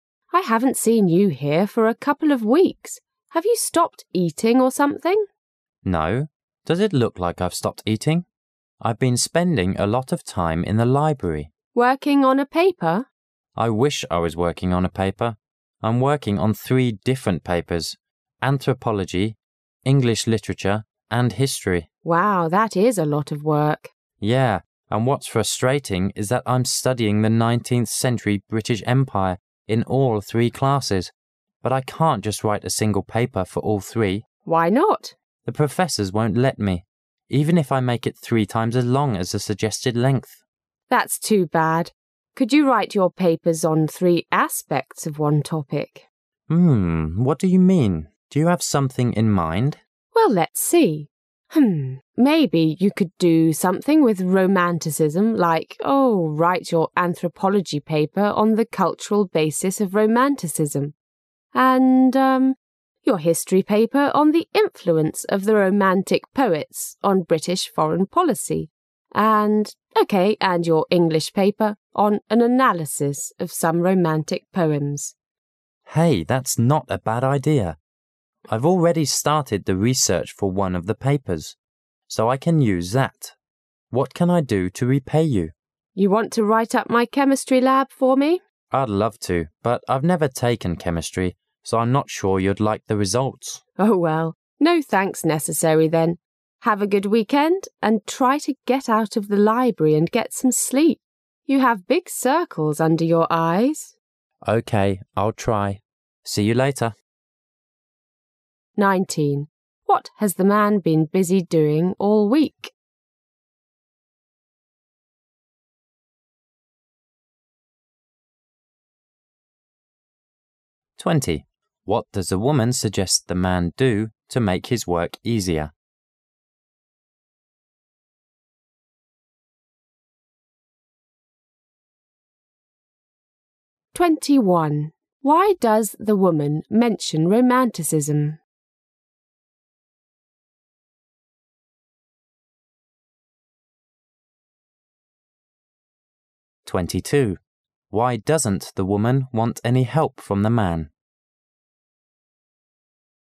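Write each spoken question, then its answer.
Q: What has the man been busy doing all week?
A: Working on three different papers in the library

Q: What does the woman suggest the man do to make his work easier?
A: Write his papers on three aspects of one topic

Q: Why does the woman mention romanticism?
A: As an example of a topic he could use for all three papers

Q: Why doesn't the woman want any help from the man?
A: He has never taken chemistry, so he can't write up her lab

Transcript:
[解析] 19-22 W: I haven't seen you here for a couple of weeks. Have you stopped eating or something? M: No. Does it look like I've stopped eating? I've been spending a lot of time in the library. W: Working on a paper? M: I wish I was working on a paper! I'm working on three different papers: anthropology, English lit, and history. W: Wow, that is a lot of work. M: Yeah, and what's frustrating is that I'm studying the nineteenth century British Empire in all three classes, but I can't just write a single paper for all three. 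W: Why not? M: The professors won't let me. Even if I make it three times as long as the suggested length. W: That's too bad. Could you write your papers on three aspects of one topic? What do you mean? Do you have something in mind? W: Well, let's see. Maybe you could do something with Romanticism, like, ohh.., write your anthropology paper on the cultural basis of Romanticism, and, uh, your history paper on the influence of the Romantic poets on British foreign policy, and, OK, and your English paper on an analysis of some Romantic poems. M: Hey, that's not a bad idea! I've already started the research for one of the papers, so I can use that. What can I do to repay you? W: You want to write up my chemistry lab for me? M: I'd love to, but I've never taken chemistry, so I'm not sure you'd like the results. W: Oh well, no thanks necessary then. Have a good weekend, and try to get out of the library and get some sleep. 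You have big circles under your eyes. M: OK, I'll try. See you later.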